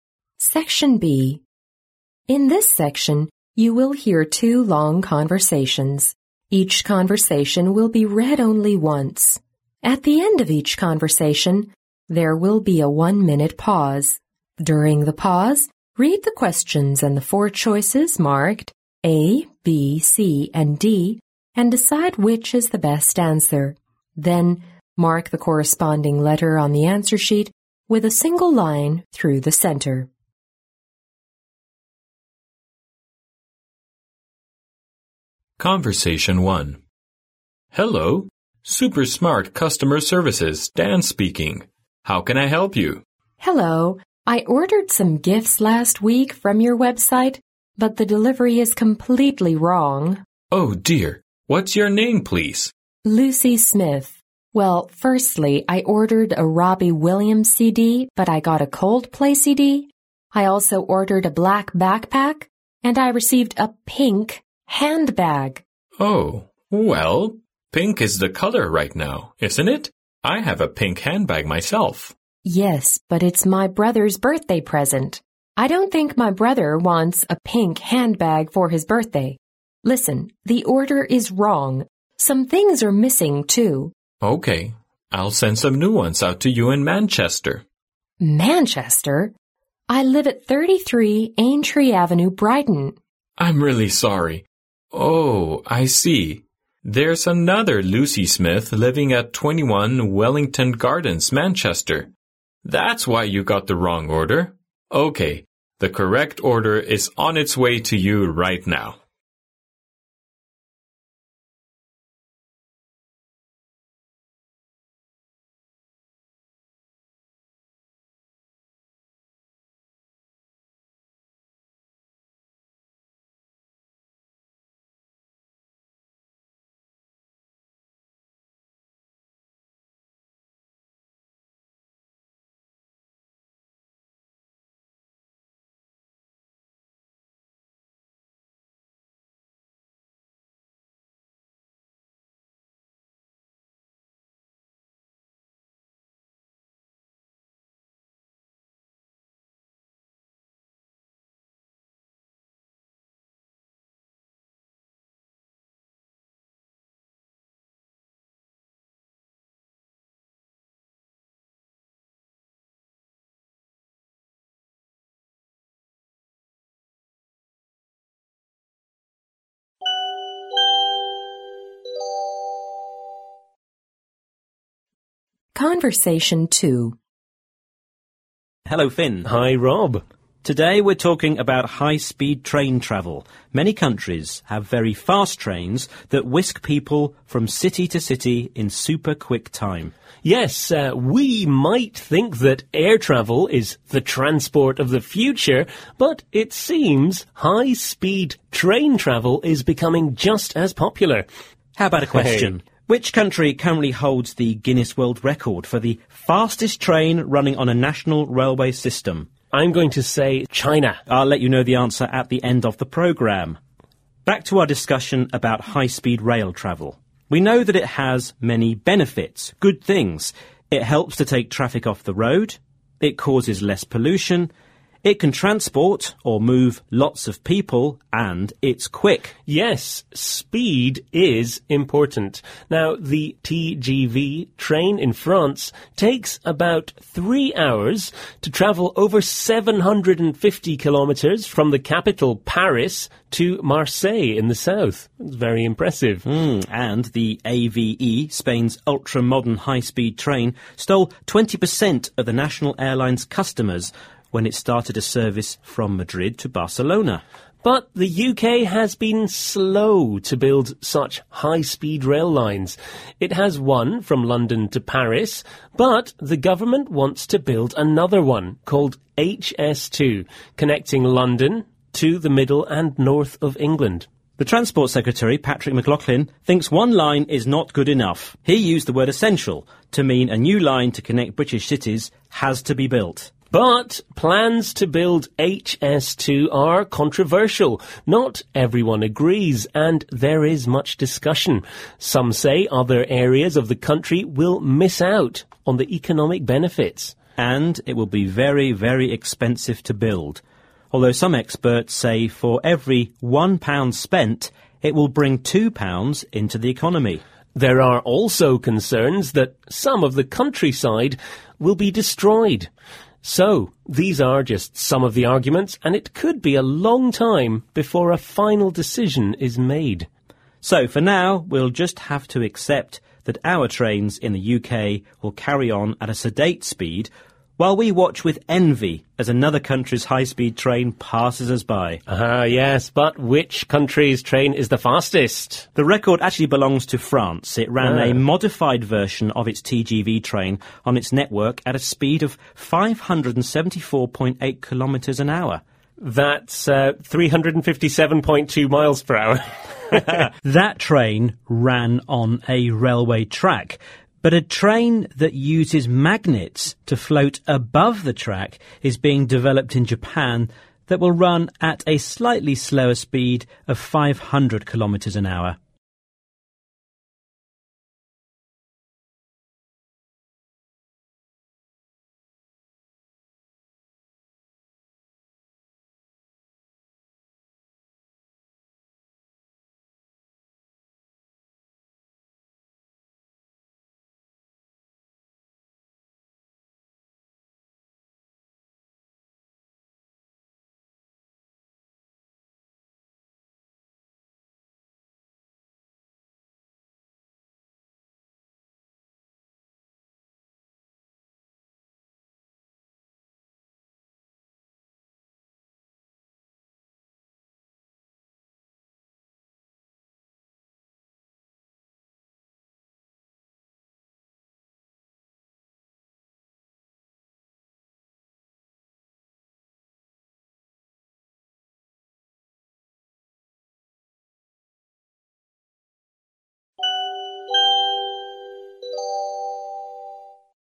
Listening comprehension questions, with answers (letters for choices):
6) What is the relationship between Dan and Lucy?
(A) Doctor and patient.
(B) Librarian and student.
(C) Manager and secretary.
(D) Salesperson and customer.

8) Why has Lucy bought these items?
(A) She bought them for his brother's wedding.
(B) They are for her brother's birthday.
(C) They are sold cheaply on the website.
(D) She bought them for a friend in Brighton.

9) How did the problem happen?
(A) Lucy left a wrong address on the website.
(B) The items Lucy ordered were out of stock.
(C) There was a Lucy with a different address.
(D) Lucy moved to Brighton last week.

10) What do we learn from the conversation?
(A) Lucy's brother likes Coldplay CDs.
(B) Lucy Smith is a popular name in London.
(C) The website made a mistake in delivery.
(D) Black is a popular colour right now.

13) What cannot we infer from the conversation about the building of HS2 in Britain?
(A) It is too expensive.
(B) It will make travel easier.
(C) It has caused controversy in the nation.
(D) It is likely to be realized in the near future.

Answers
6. D
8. B
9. C
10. C
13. D

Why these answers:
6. 对话开头便指出,Dan说这是超级智能顾客服务处,"Hello, Super Smart Customer Services",然后Lucy说"I ordered some gifts",即他们是销售人员和顾客的关系,因此答案选D。
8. 在录音中Lucy回答Dan说"but it's my brother's birthday present",即这些东西是她给哥哥的生日礼物,因此答案选B。
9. 对话中Lucy回答"I live at 33 Aintree Avenue, Brighton",然后Dan发现"there's another Lucy Smith living at 21 Wellington Gardens, Manchester",即还有一个住在其他地方也叫Lucy的人。因此答案是C。
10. 根据上题可分析出,是工作人员在送货过程中出现了错误。因此答案选C。
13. 根据对话中Finn所说,"it could be a long time before a final decision is made"可知,在最终做出决定前还需要很长的时间,与D项中表达的有可能不久就会实现相悖。因此答案选D。

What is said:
M: Hello, Super Smart Customer Services, Dan speaking. How can I help you?
F: Hello. I ordered some gifts last week from your website, but the delivery is completely wrong!
M: Oh dear! What's your name, please?
F: Lucy Smith. Well, firstly, I ordered a Robbie Williams CD but I got a Coldplay CD. I also ordered a black backpack, and I received a pink handbag.
M: Oh ... Well, pink is the colour right now, isn't it? I have a pink handbag myself.
F: Yes, but it's my brother's birthday present. I don't think my brother wants a pink handbag for his birthday! Listen, the order is wrong! Some things are missing, too.
M: OK, I'll send some new ones out to you in Manchester.
F: Manchester? I live at 33 Aintree Avenue, Brighton.
M: I'm really sorry. Oh, I see, there's another Lucy Smith living at 21 Wellington Gardens, Manchester. That's why you got the wrong order! OK, the correct order is on its way to you right now.
Conversation Two
11 How long does it take if you travel to Marseille from Paris in the regular TGV train?
A. Two hours.
B. Three hours.
C. Three and a half hours.
D. Four hours.
12 What is the purpose of building the HS2 high-speed rail line in Britain?
A. To compete with those countries having fast train service.
B. To encourage more people to take fast trains.
C. To lighten the burden of the nation's air transport.
Rob: Today we're talking about high-speed train travel. Many countries have very fast trains that whisk people from city to city in super-quick time.
Finn: Yes, we might think that air travel is the transport of the future but it seems high-speed train travel is becoming just as popular.
Rob: How about a question? Which country currently holds the Guinness record for the fastest train running on a national railway system?
Finn: I'm going to say China.
Rob: I'll let you know the answer at the end of programme. Back to our discussion about high-speed rail travel. We know that it has many benefits—good things: it helps to take traffic off the road, it causes less pollution, it can transport or move lots of people and it's quick.
Finn: Yes, speed is important. Now, the TGV train in France takes about three hours to travel over 750 kilometres from the capital, Paris, to Marseille in the south—very impressive.
Rob: And the AVE—Spain's ultra-modern high-speed train—stole 20 percent of the national airlines' customers when it started a service from Madrid to Barcelona.
Finn: But the UK has been slow to build such high-speed rail lines. It has one from London to Paris but the government wants to build another one—called HS2—connecting London to the middle and north of England.
Rob: The Transport Secretary, Patrick McLoughlin, thinks one line is not good enough. He used the word "essential" to mean a new line to connect British cities has to be built.
Finn: But plans to build HS2 are controversial—not everyone agrees and there is much discussion. Some say other areas of the country will miss out on the economic benefits.
Rob: And it will be very very expensive to build—although some experts say for every £1 spent, it will bring £2 into the economy.
Finn: There are also concerns that some of the countryside will be destroyed. So these are just some of the arguments and it could be a long time before a final decision is made.
Rob: So for now we'll just have to accept that our trains in the UK will carry on at a sedate speed while we watch with envy as another country's high-speed train passes us by!
Finn: Er, yes, bat which country's train is the fastest?
Rob: The record actually belongs to France. It ran a modified version of its TGV train on its network at a speed of574.8 km/h.
Finn: That's 357.2 miles per hour.
Rob: That train ran on a railway track—but a train that uses magnets to float above the track is being developed in Japan that will run, at a slightly slower speed, at 500 km/h.